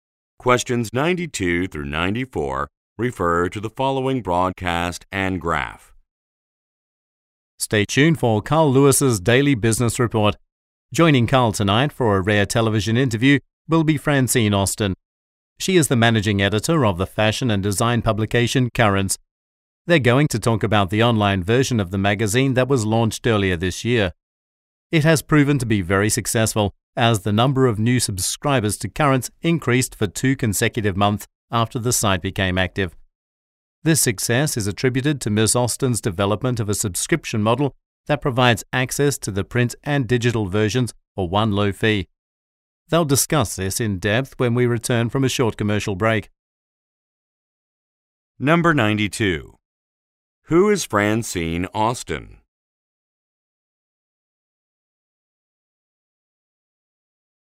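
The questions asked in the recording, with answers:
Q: Who is Francine Austin?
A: The managing editor of Currents magazine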